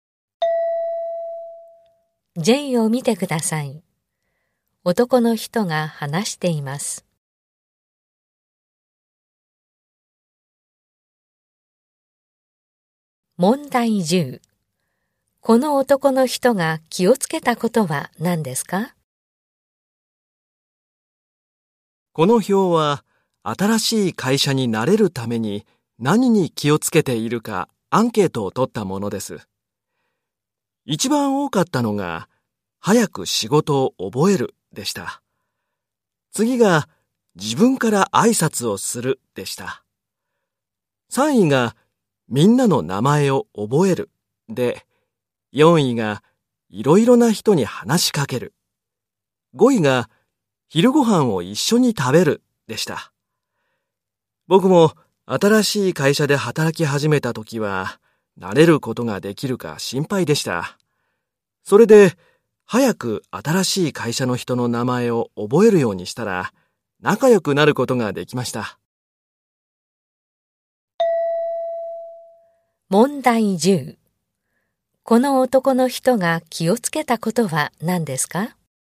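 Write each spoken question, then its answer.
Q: この男の人が気をつけたことは何ですか?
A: 会社の人の名前を早く覚えること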